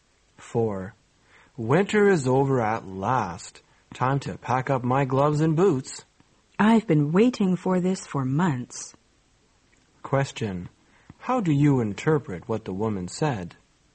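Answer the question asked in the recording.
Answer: She is glad winter is over.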